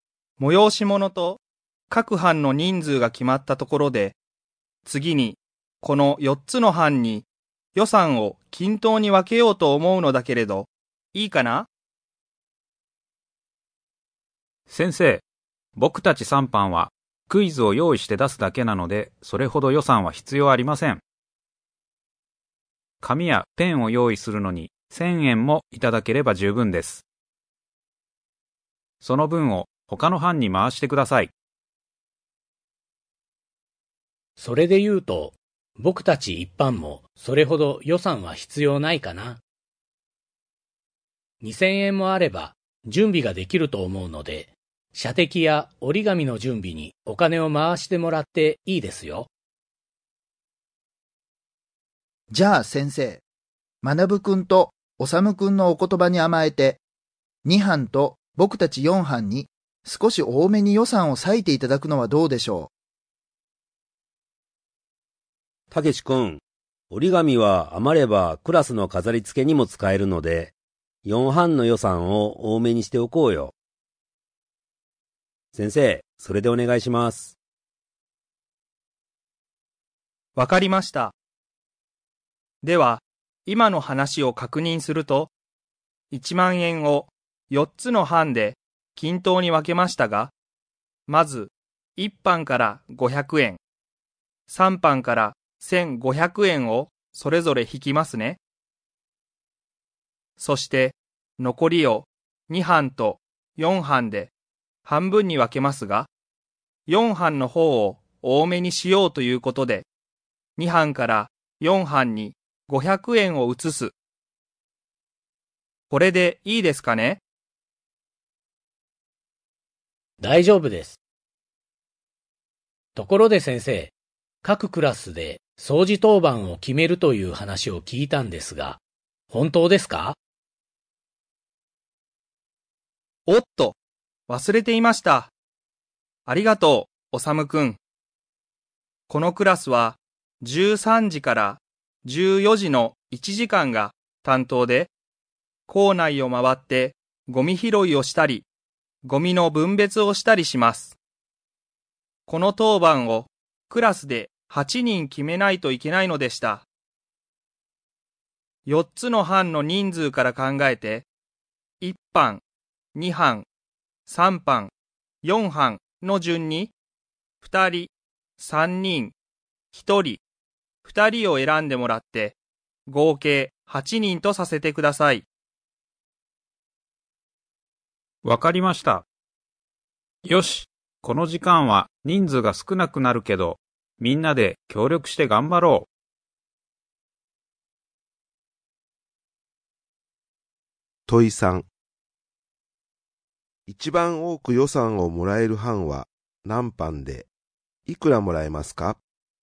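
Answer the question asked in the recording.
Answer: 4班、4000円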